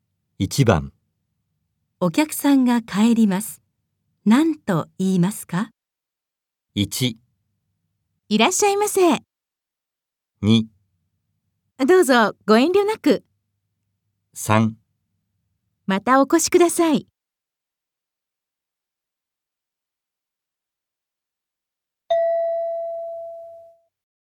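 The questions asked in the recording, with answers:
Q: お客さんが帰ります。何と言いますか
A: 3: またお越しください。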